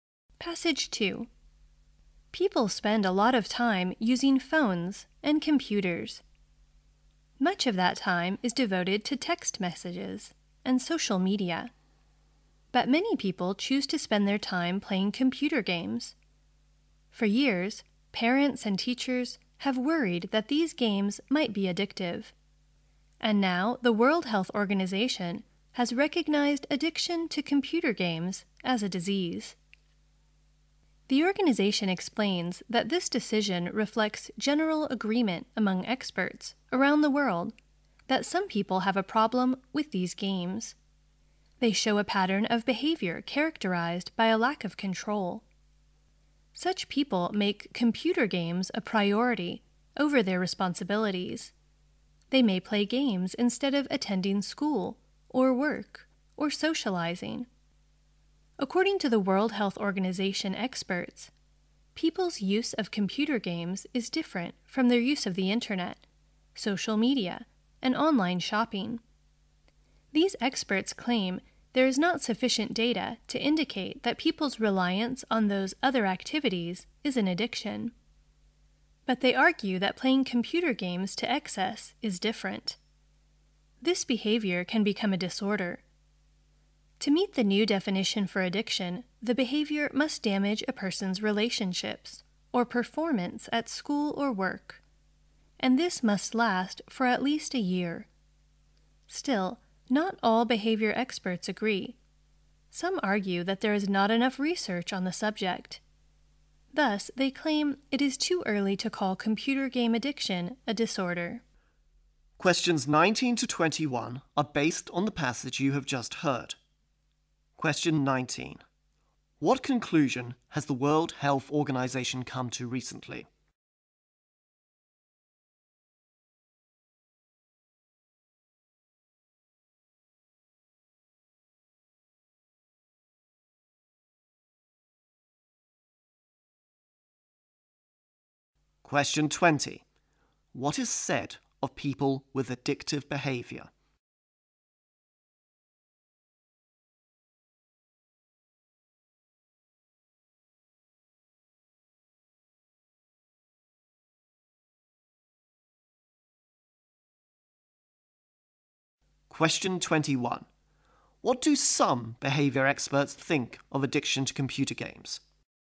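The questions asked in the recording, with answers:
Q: What conclusion has the World Health Organization come to recently?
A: Addiction to computer games is a disease

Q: What is said of people with addictive behavior?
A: They lack control and put games before their responsibilities

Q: What do some behavior experts think of addiction to computer games?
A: It is too early to call it a disorder because there is not enough research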